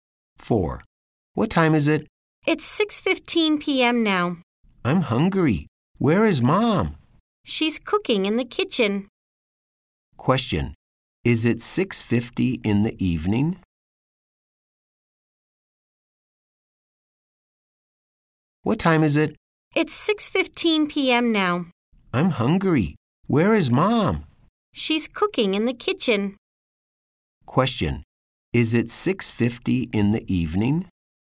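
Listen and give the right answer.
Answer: No, it's 6:15 p.m.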